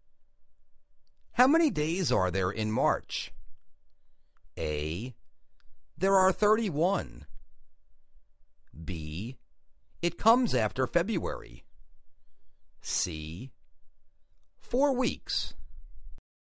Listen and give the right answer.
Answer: There are 31